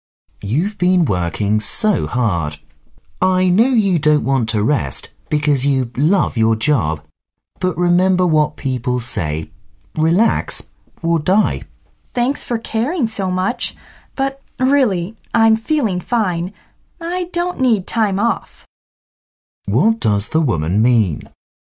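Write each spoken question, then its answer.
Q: What does the woman mean?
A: She feels fine and doesn't need time off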